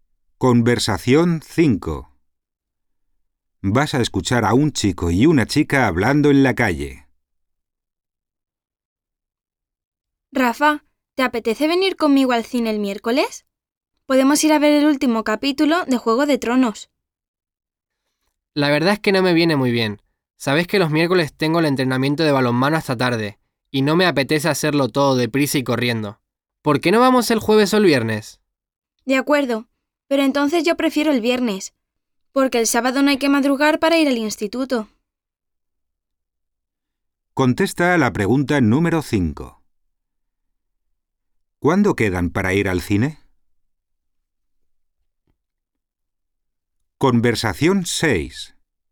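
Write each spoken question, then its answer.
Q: ¿Cuándo quedan para ir al cine?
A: El viernes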